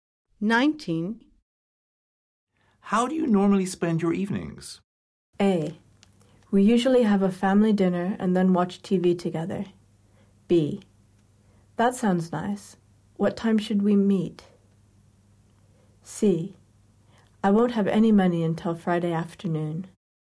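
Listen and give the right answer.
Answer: A: We usually have a family dinner and then watch TV together.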